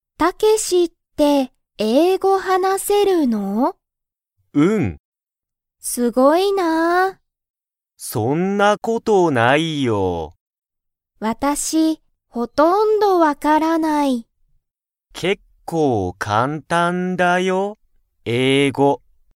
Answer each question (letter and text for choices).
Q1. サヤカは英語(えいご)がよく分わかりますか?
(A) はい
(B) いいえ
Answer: (B) いいえ

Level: Level 1